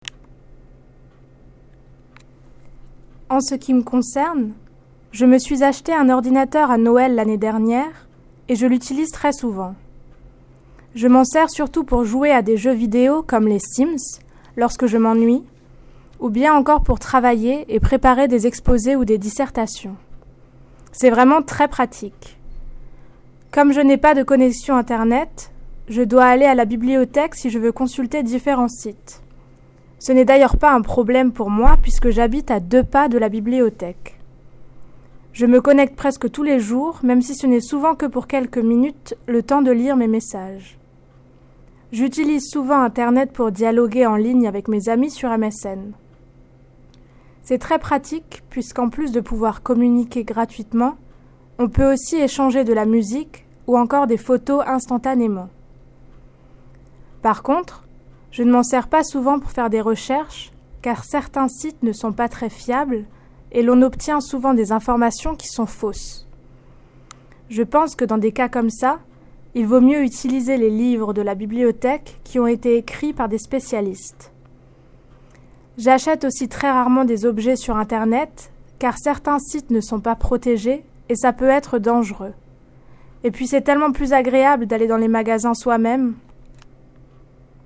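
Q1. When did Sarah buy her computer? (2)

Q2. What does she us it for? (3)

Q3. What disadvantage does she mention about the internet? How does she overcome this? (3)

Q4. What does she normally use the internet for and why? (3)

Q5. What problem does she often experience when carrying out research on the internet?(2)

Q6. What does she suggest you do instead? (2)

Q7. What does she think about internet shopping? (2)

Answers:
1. At Christmas last year
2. Playing video games like the Sims when bored, and working on presentations and essays
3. She has no internet connection; she goes to the library, which is very close to her home
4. Chatting with friends on MSN; it is free and she can swap music and photos instantly
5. Some sites are unreliable and the information is often wrong
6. Use library books written by specialists
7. Some sites are not secure so it can be dangerous; going to the shops yourself is nicer

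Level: New Higher French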